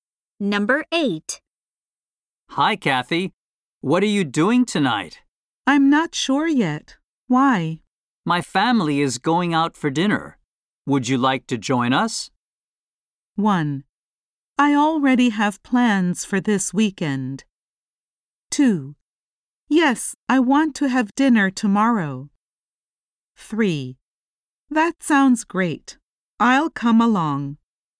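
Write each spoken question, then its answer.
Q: Would you like to join us?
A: 3: That sounds great. I'll come along.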